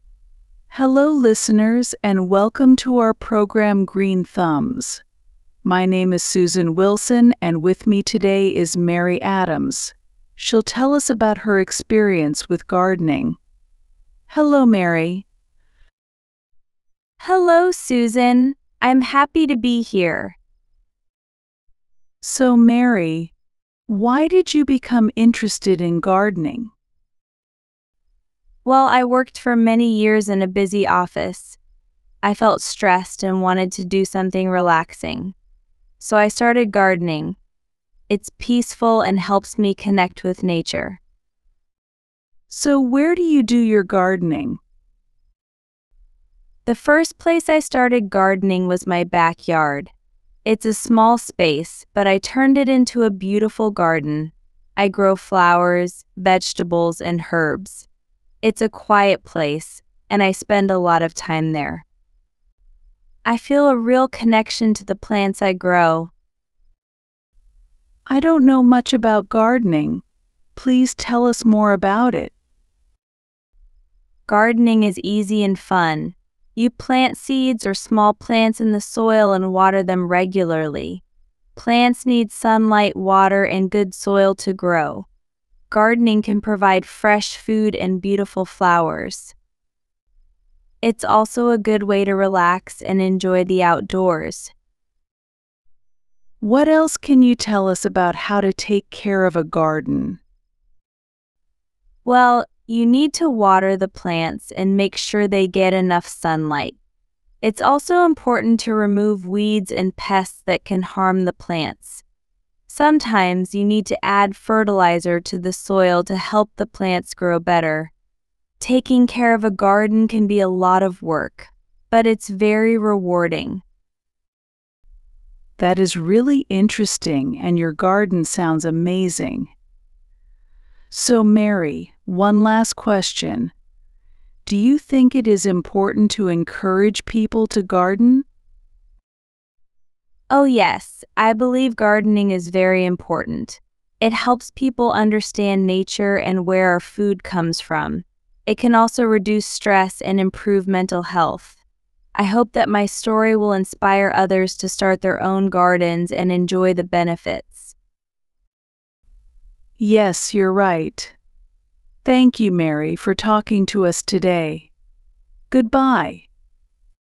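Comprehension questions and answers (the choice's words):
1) Why did Mary start gardening?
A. She wanted to grow her own food.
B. She needed a way to relax.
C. She had a large backyard.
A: She needed a way to relax.

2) Why is Mary's garden special to her?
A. She grows many different types of plants.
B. It is a peaceful place for her.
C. It is very large.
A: It is a peaceful place for her.

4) What does Mary explain about the benefits of gardening?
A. It helps people understand nature.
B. It is a good way to meet new people.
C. It requires a lot of special equipment.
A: It helps people understand nature.

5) What does Mary hope her story will inspire others to do?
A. Start their own gardens.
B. Visit her garden.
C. Buy more vegetables.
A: Start their own gardens.

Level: 3 יחידות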